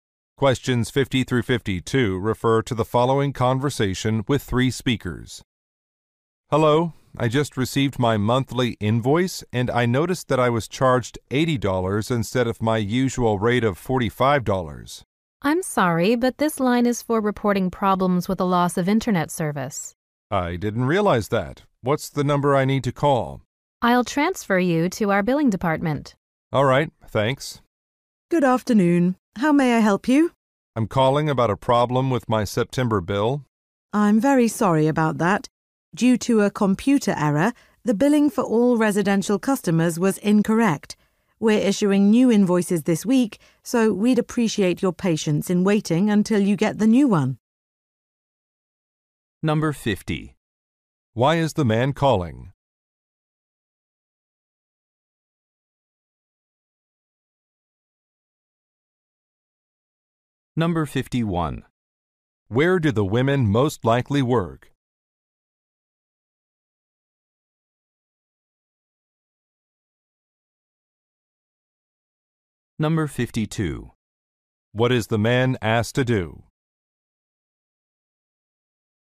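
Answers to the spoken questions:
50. He was overcharged on his bill
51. At an internet service provider
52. Wait for a new invoice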